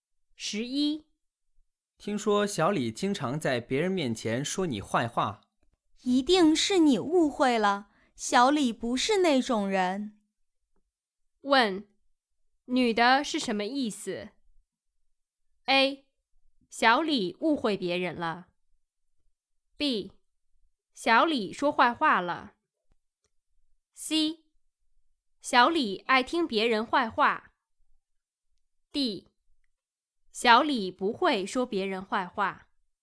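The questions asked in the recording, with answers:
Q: 问,女的是什么意思? A. 小李误会别人了。 B. 小李说坏话了。 C.小李爱听别人坏话。 D. 小李不会说别人坏话。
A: D: 小李不会说别人坏话。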